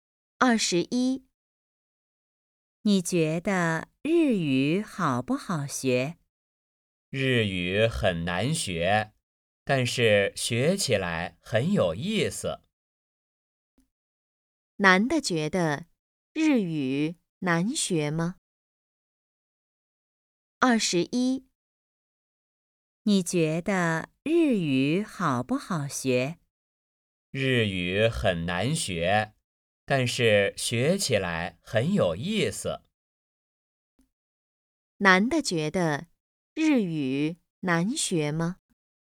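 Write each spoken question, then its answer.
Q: 男的觉得日语难学吗?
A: 很难学,但是很有意思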